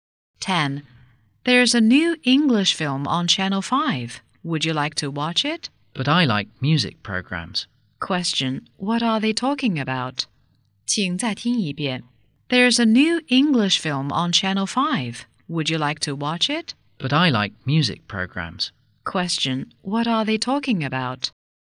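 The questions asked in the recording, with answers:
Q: What are they talking about?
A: TV programs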